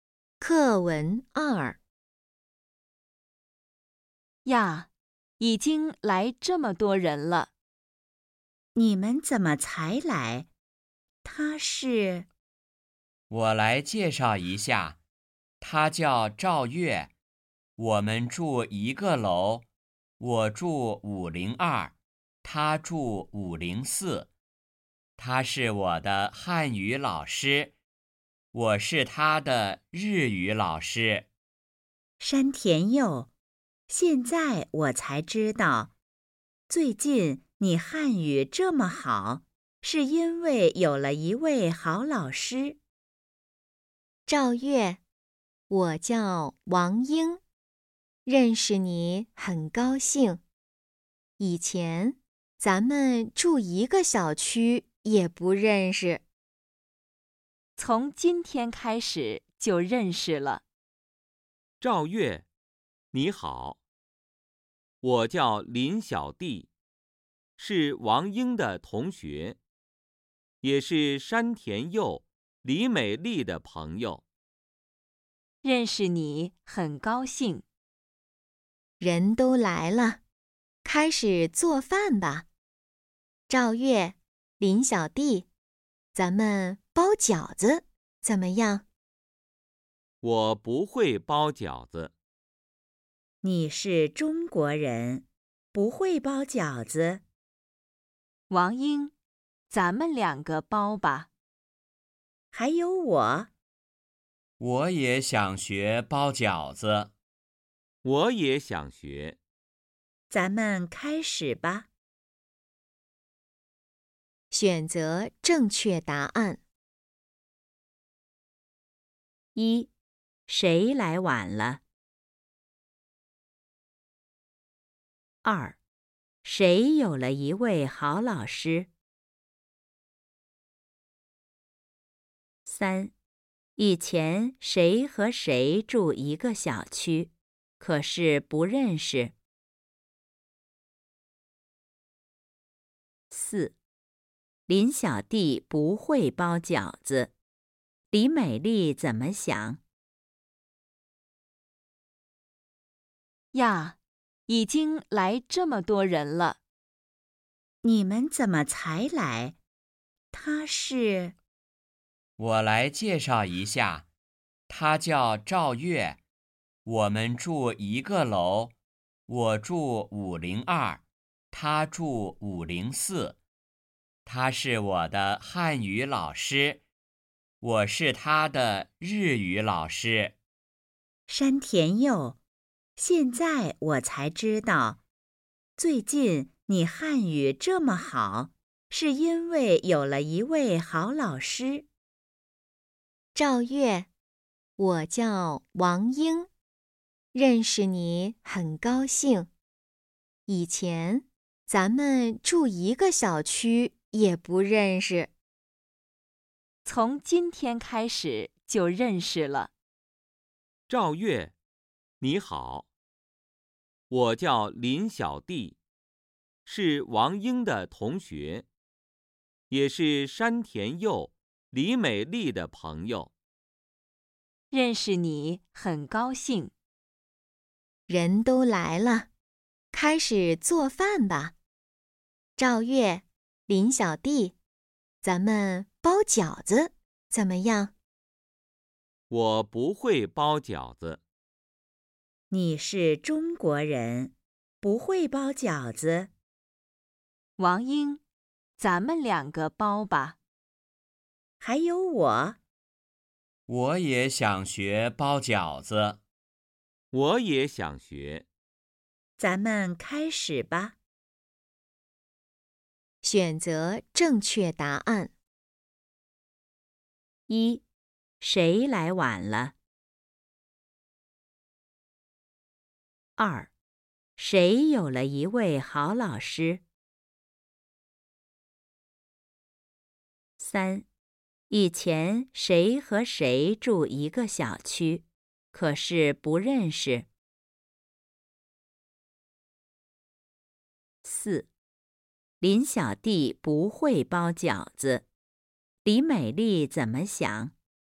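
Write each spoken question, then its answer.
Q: 谁有了一位好老师?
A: 山田佑

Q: 以前谁和谁住一个小区,可是不认识。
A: 王英和赵月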